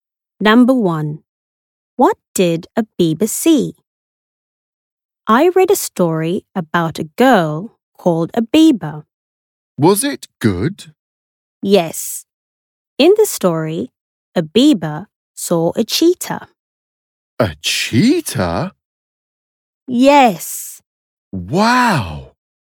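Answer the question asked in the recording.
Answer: A cheetah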